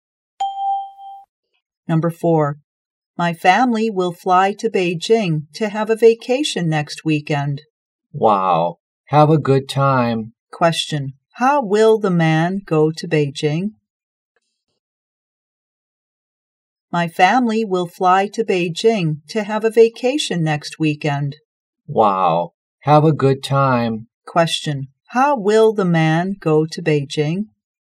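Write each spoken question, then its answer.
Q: How will the man go to Beijing?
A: By plane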